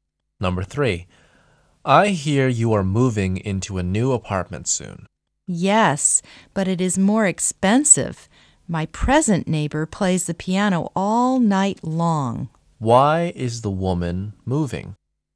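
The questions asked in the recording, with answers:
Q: Why is the woman moving?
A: Her present neighbor plays the piano all night and it's too noisy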